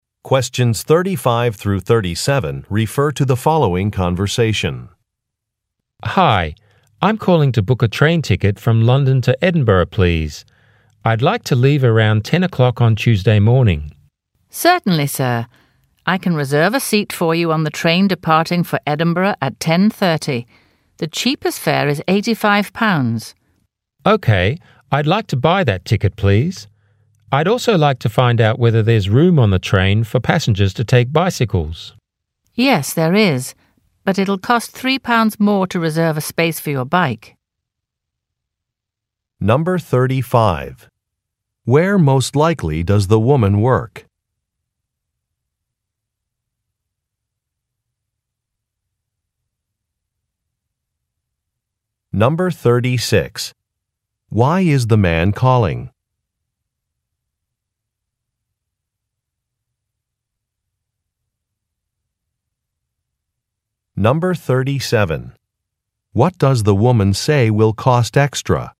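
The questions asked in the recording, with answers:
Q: Why is the man calling?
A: To book a train ticket

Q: What does the woman say will cost extra?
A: Reserving a space for a bicycle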